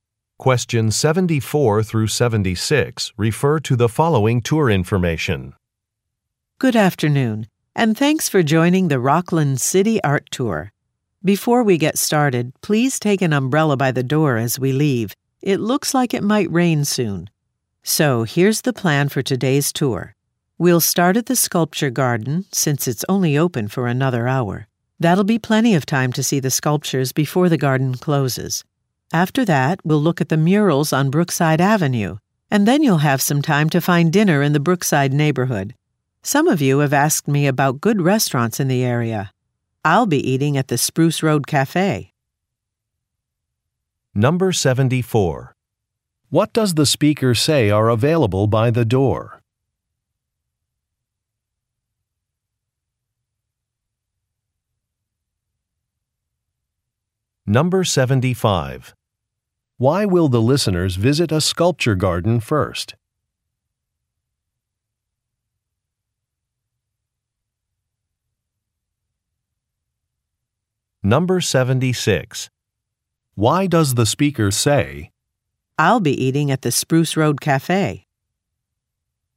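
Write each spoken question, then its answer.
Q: What does the speaker say are available by the door?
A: Umbrellas

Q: Why will the listeners visit a sculpture garden first?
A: It will close soon

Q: I'll be eating at the Spruce Road Cafe?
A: To recommend a restaurant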